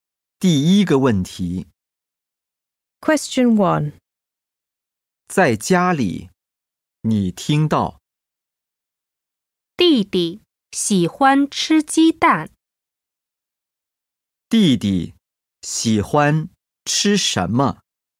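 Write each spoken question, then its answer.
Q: 弟弟喜欢吃什么?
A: 鸡蛋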